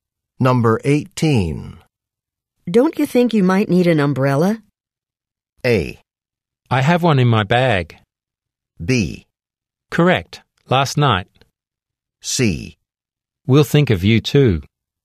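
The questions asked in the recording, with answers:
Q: Don't you think you might need an umbrella?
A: A: I have one in my bag.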